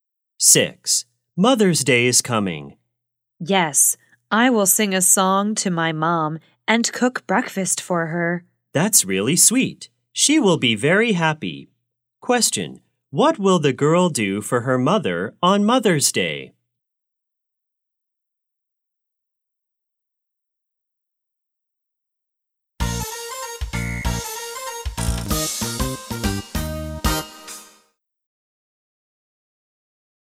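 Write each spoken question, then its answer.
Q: Question, what will the girl do for her mother on Mother's Day?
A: Sing a song to her and cook breakfast for her.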